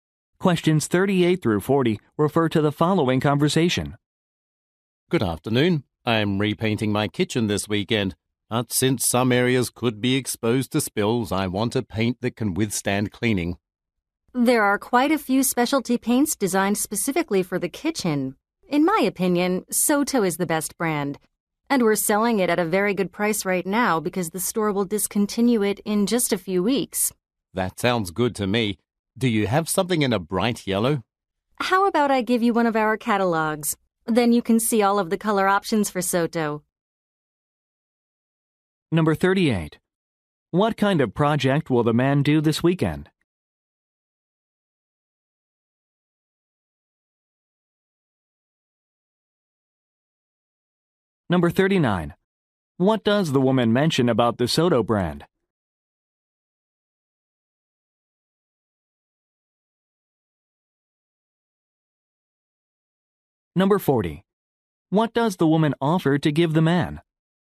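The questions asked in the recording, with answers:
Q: What kind of project will the man do this weekend?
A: Repainting his kitchen

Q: What does the woman mention about the Soto brand?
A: It will be discontinued soon, so it is on sale at a good price

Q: What does the woman offer to give the man?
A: A catalog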